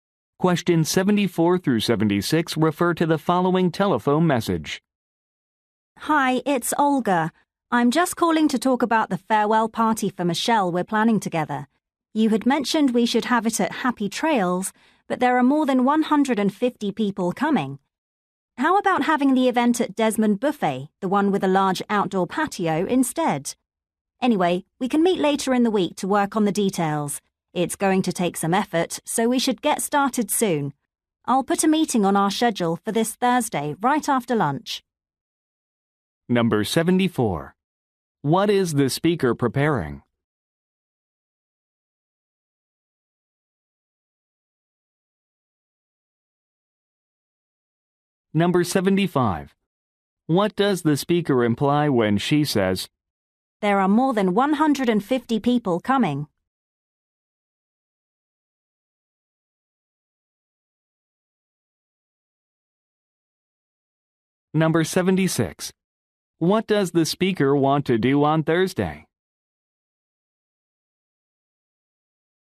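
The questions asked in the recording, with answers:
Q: What is the speaker preparing?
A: A farewell party

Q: What does the speaker want to do on Thursday?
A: Meet to work on the party details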